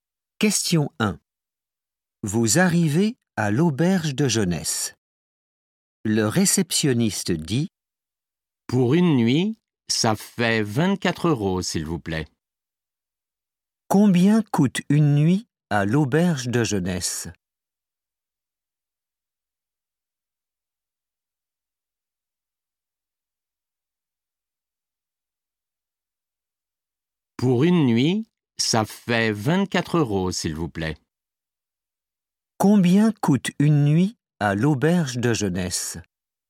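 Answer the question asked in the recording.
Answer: 24 euros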